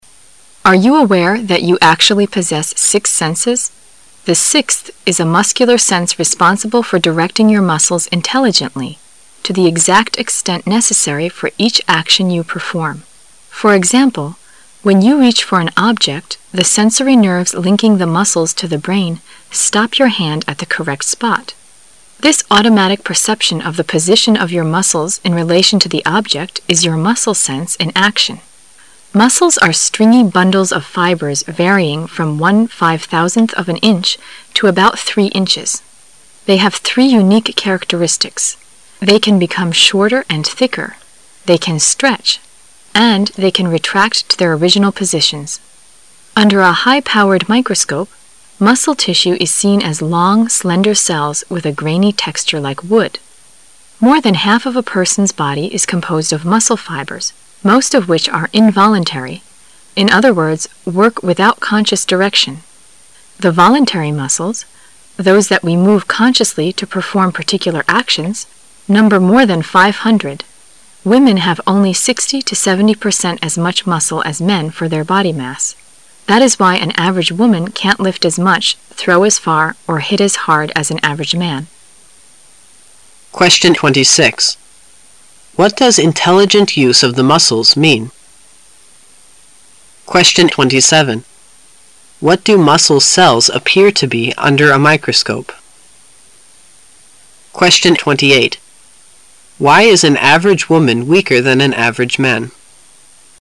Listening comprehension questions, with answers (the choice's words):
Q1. What do muscle cells appear to be under a microscope?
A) Like wood in texture.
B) Like wood in color.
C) Smooth and thin.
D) Short and thick.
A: Like wood in texture.

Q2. Why is an average woman weaker than an average man?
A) Because she has less muscle fiber for her body weight.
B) Because she has less voluntary muscle than an average man.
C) Because she has 60 to 70 percent less muscle for her body mass.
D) Because she has only 60 to 70 percent as much muscle as a man for her body mass.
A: Because she has only 60 to 70 percent as much muscle as a man for her body mass.

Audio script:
[解析] 26-28 Are you aware that you actually possess six senses? The sixth is a muscular sense responsible for directing your muscles intelligently—to the exact extent necessary for each action you perform. For example, when you reach for an object, the sensory nerves linking the muscles to the brain stop your hand at the correct spot. This automatic perception of the position of your muscles in relation to the object is your muscle sense in action. Muscles are stringy bundles of fibers varying from one five-thousandth of an inch to about three inches. They have three unique characteristics: they can become shorter and thicker; they can stretch; and they can retract to their original positions. Under a high-powered microscope, muscle tissue is seen as long, slender cells with a grainy texture like wood. More than half of a person's body is composed of muscle fibers, most of which are involuntary—in other words, work without conscious direction. The voluntary muscles, those that we move consciously to perform particular actions, number more than five hundred. Women have only 60 to 70 percent as much muscle as men for their body mass. That is why an average woman can't lift as much, throw as far, or hit as hard as an average man. What does intelligent use of the muscles mean?